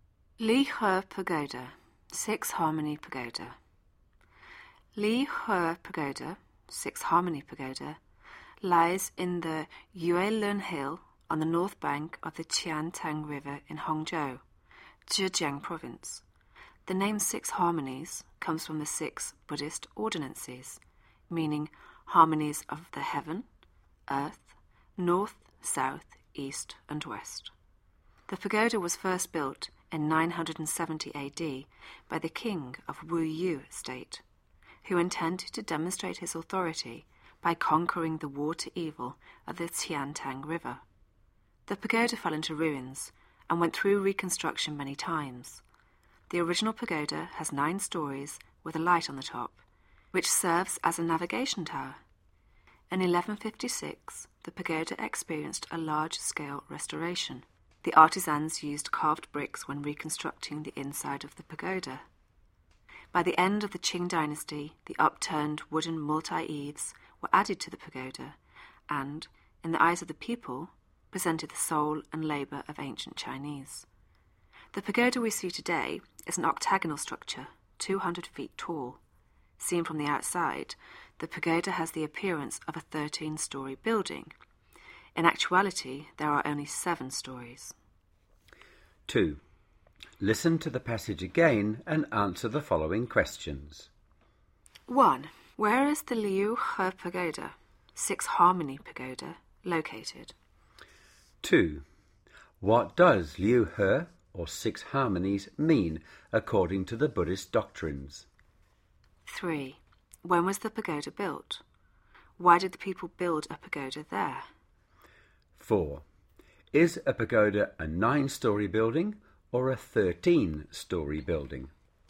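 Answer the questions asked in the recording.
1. In the Yue Lun Hill on the north bank of the Qiantang River in Hangzhou, Zhejiang Province
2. Harmonies of the heaven, earth, north, south, east and west
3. In 970 AD
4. The king of Wu Yue wanted to show his authority by conquering the water evil of the Qiantang River
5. Neither: it looks like 13 storeys from outside but actually has only 7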